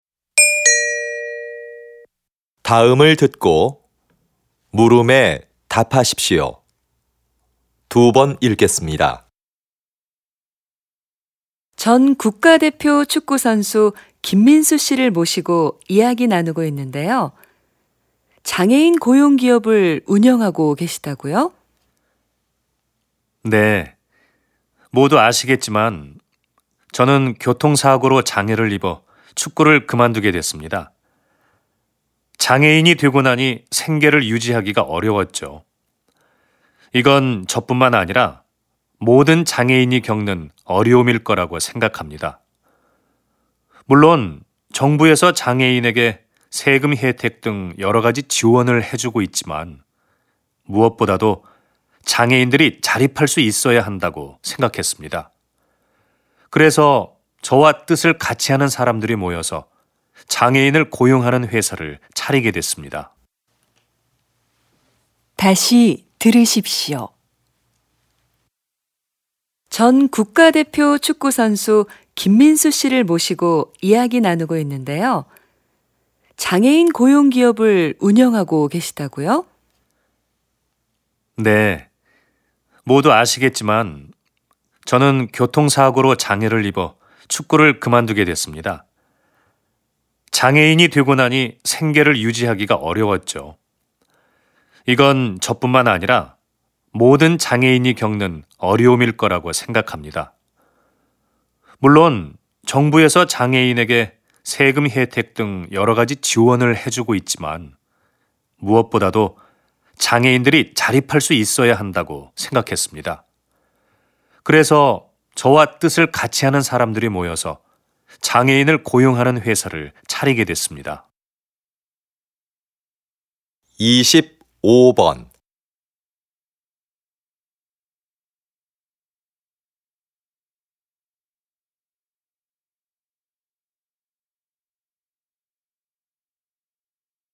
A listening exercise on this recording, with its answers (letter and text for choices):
[25~26] 다음을 듣고 물음에 답하십시오.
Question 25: 남자의 중심 생각으로 맞는 것을 고르십시오.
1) 장애인을 위한 시설을 늘려야 한다.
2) 장애인들에게 세금을 깎아 줘야 한다.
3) 정부는 운동선수의 재활을 도와야 한다.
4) 장애인의 자립을 위한 일자리가 필요하다.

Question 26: 들은 내용으로 맞는 것을 고르십시오.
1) 남자는 장애를 극복하고 국가대표가 되었다.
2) 남자는 사고를 당해 축구를 할 수 없게 되었다.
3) 남자는 사업가가 되기 위해 운동을 그만두었다.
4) 남자는 정부 지원을 받기 위해 회사를 설립했다.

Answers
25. 4) 장애인의 자립을 위한 일자리가 필요하다.
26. 2) 남자는 사고를 당해 축구를 할 수 없게 되었다.

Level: TOPIK II